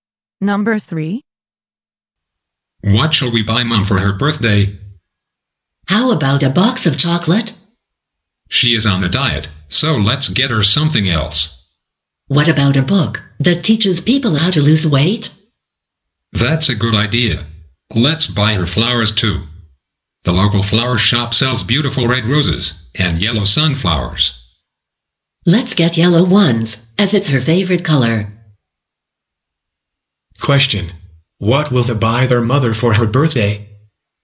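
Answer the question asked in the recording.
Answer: A book on how to lose weight and yellow sunflowers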